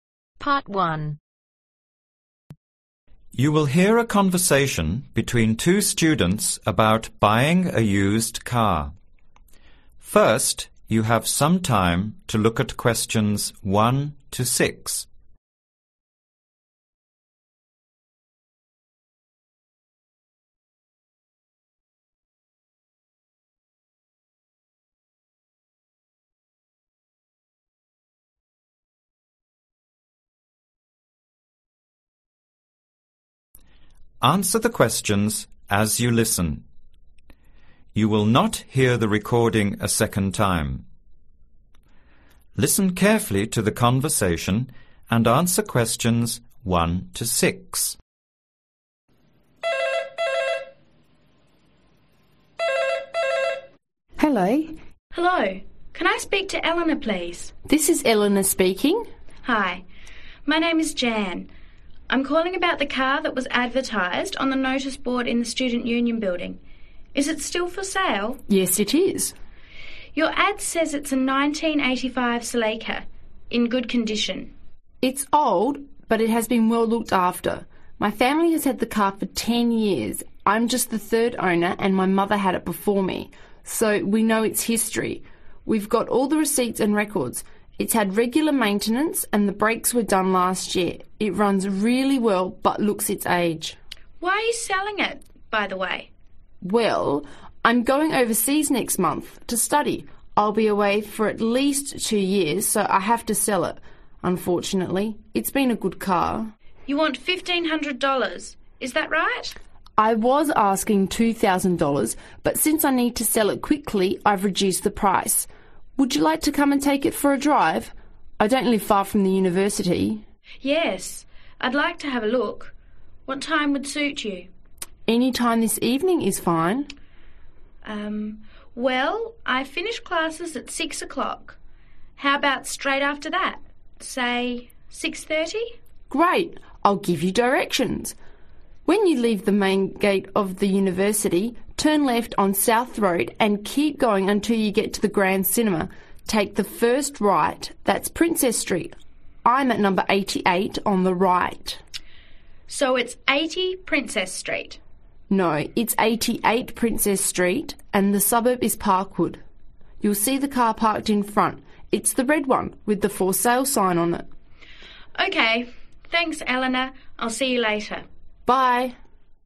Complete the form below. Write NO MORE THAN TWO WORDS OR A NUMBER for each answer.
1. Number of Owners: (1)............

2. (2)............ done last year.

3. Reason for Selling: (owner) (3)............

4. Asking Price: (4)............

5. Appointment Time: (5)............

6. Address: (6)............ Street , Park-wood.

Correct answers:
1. 3
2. Brakes
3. Going overseas
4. $1500
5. 6.30
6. 88 Princess